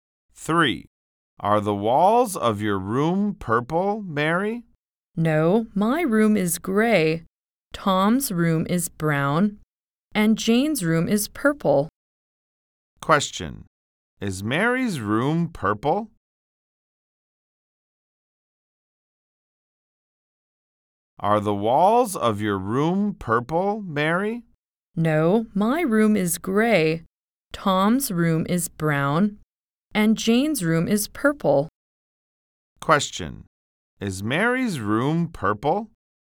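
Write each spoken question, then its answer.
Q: Is Mary's room purple?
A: No, it's gray.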